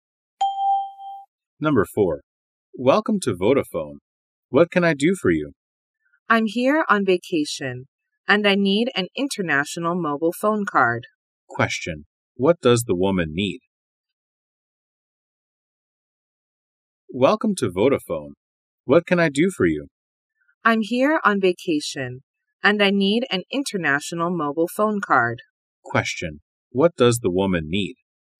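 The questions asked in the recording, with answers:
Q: What does the woman need?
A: An international mobile phone card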